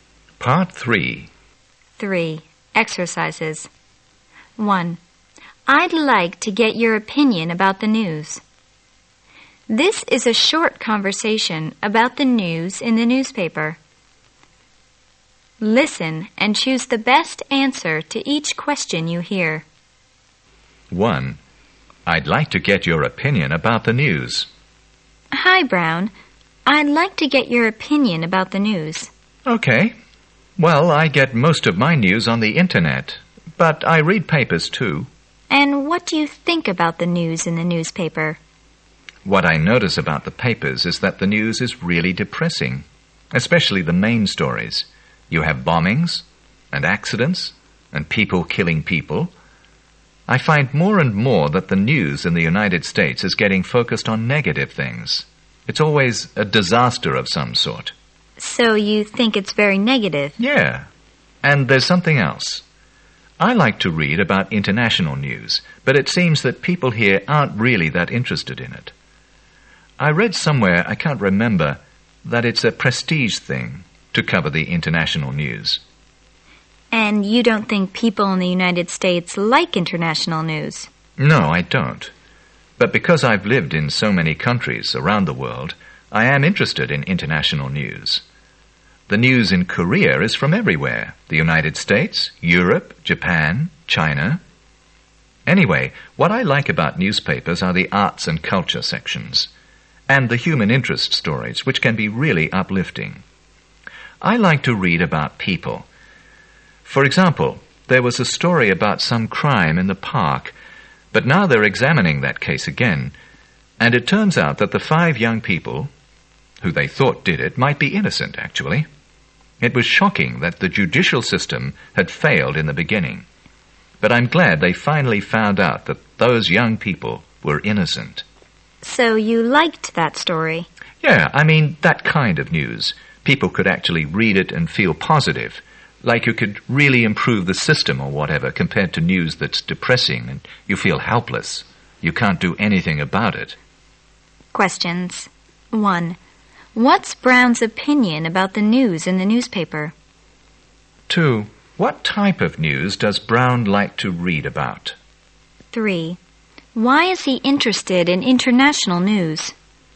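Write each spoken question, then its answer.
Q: What's Brown's opinion about the news in the newspaper?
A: It is depressing and focuses on negative things

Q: Why is he interested in international news?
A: Because he has lived in many countries around the world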